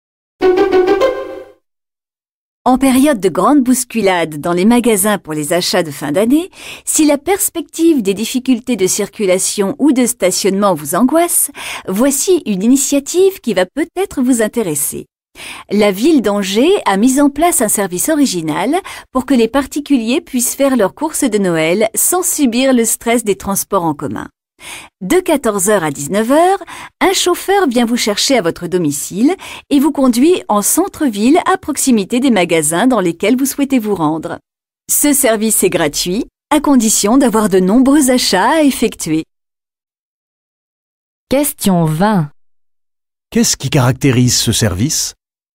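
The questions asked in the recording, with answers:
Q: Qu'est-ce qui caractérise ce service?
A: Un chauffeur gratuit conduit les habitants de leur domicile aux magasins pour leurs courses de Noël.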